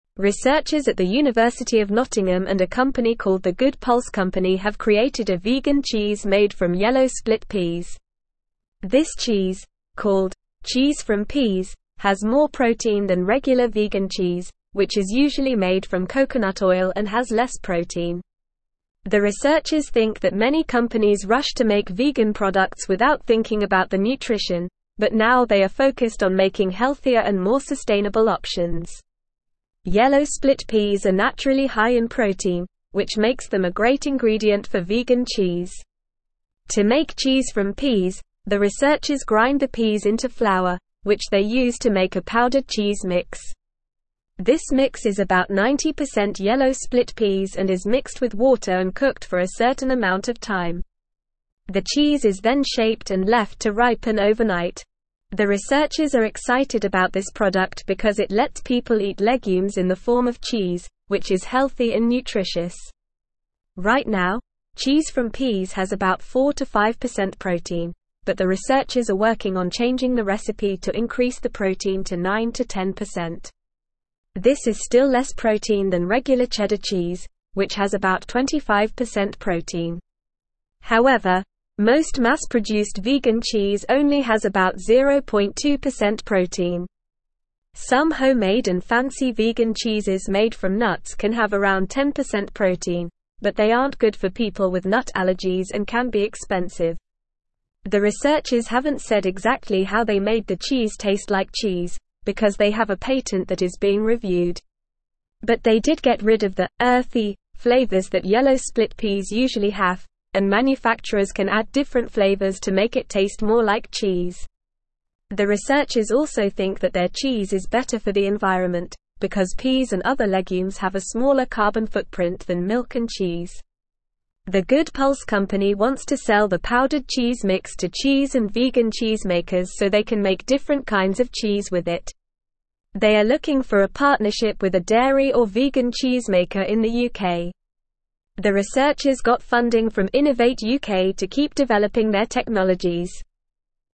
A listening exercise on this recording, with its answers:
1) Researchers at the University of Nottingham and a company called The Good Pulse Company have created a (1)______ cheese made from yellow split peas.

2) The (2)______ think that many (3)______ rushed to make vegan products without thinking about the nutrition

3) The (2)______ think that many (3)______ rushed to make vegan products without thinking about the nutrition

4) Yellow split peas are naturally high in protein, which makes them a (4)______ ingredient for vegan (5)______.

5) Yellow split peas are naturally high in protein, which makes them a (4)______ ingredient for vegan (5)______.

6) To make Cheese from Peas, the researchers (6)______ the peas into flour, which they use to make a powdered cheese mix.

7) This mix is about 90% yellow split peas and is mixed with water and cooked for a (7)______ amount of time.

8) Right now, Cheese from Peas has about 4-5% protein, but the researchers are working on changing the (8)______ to increase the protein to 9-10%.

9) This is still less protein than regular (9)______ cheese, which has about 25% protein.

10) Some (10)______ and fancy vegan cheeses made from nuts can have around 10% protein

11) But they did get rid of the "earthy" (11)______ that (12)______ split peas usually have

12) But they did get rid of the "earthy" (11)______ that (12)______ split peas usually have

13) manufacturers can add (13)______ flavors to make it taste more like cheese.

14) The researchers also think that their cheese is (14)______ for the environment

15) because peas and other legumes have a smaller carbon (15)______ than milk and cheese.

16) They are looking for a (16)______ with a dairy or vegan cheese maker in the UK.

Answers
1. vegan
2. researchers
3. companies
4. great
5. cheese
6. grind
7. certain
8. recipe
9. cheddar
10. homemade
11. flavors
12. yellow
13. different
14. better
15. footprint
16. partnership

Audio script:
Researchers at the University of Nottingham and a company called The Good Pulse Company have created a vegan cheese made from yellow split peas. This cheese, called "Cheese from Peas," has more protein than regular vegan cheese, which is usually made from coconut oil and has less protein. The researchers think that many companies rushed to make vegan products without thinking about the nutrition, but now they are focused on making healthier and more sustainable options. Yellow split peas are naturally high in protein, which makes them a great ingredient for vegan cheese.
To make Cheese from Peas, the researchers grind the peas into flour, which they use to make a powdered cheese mix. This mix is about 90% yellow split peas and is mixed with water and cooked for a certain amount of time. The cheese is then shaped and left to ripen overnight. The researchers are excited about this product because it lets people eat legumes in the form of cheese, which is healthy and nutritious.
Right now, Cheese from Peas has about 4-5% protein, but the researchers are working on changing the recipe to increase the protein to 9-10%. This is still less protein than regular cheddar cheese, which has about 25% protein. However, most mass-produced vegan cheese only has about 0.2% protein. Some homemade and fancy vegan cheeses made from nuts can have around 10% protein, but they aren't good for people with nut allergies and can be expensive.
The researchers haven't said exactly how they made the cheese taste like cheese, because they have a patent that is being reviewed. But they did get rid of the "earthy" flavors that yellow split peas usually have, and manufacturers can add different flavors to make it taste more like cheese. The researchers also think that their cheese is better for the environment, because peas and other legumes have a smaller carbon footprint than milk and cheese.
The Good Pulse Company wants to sell the powdered cheese mix to cheese and vegan cheese makers so they can make different kinds of cheese with it. They are looking for a partnership with a dairy or vegan cheese maker in the UK. The researchers got funding from Innovate UK to keep developing their technologies.

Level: Level 3